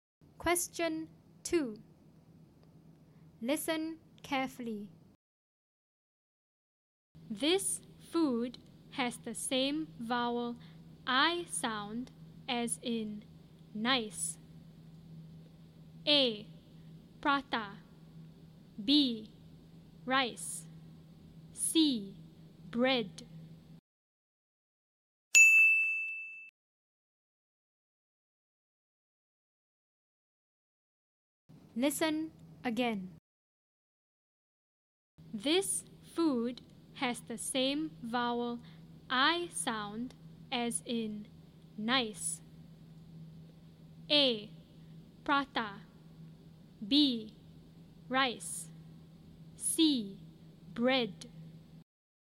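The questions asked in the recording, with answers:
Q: This food has the same vowel I sound as in nice.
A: B: Rice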